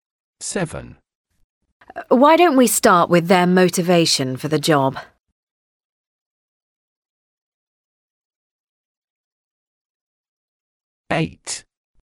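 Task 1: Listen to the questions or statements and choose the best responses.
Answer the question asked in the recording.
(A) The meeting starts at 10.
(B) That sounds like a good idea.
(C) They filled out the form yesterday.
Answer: (B) That sounds like a good idea.

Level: A2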